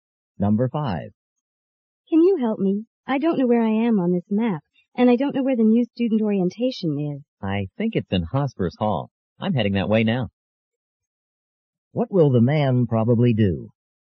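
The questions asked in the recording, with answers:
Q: What will the man probably do?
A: Walk with the woman to Hospers Hall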